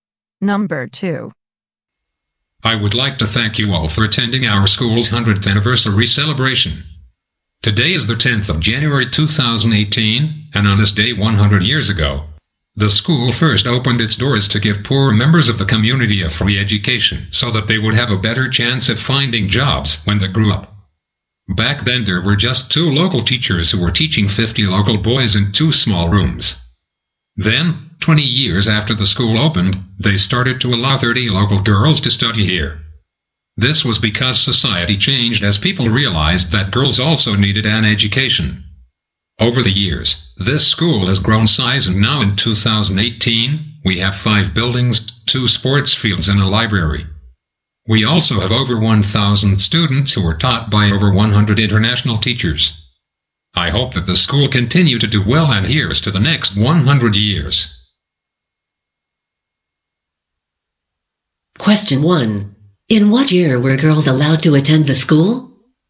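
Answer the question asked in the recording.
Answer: 1938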